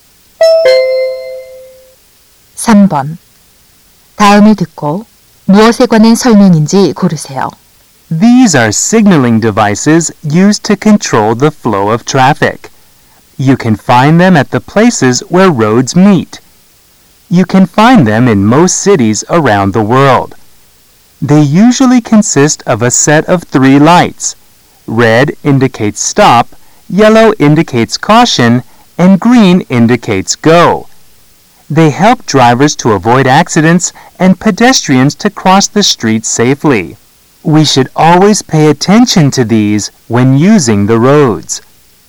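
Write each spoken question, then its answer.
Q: 다음을 듣고 무엇에 관한 설명인지 고르세요.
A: 신호등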